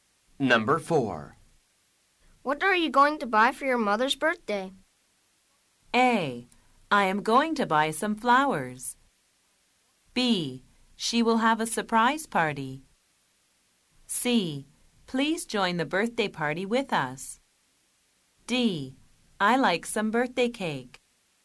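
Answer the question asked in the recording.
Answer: A: I am going to buy some flowers.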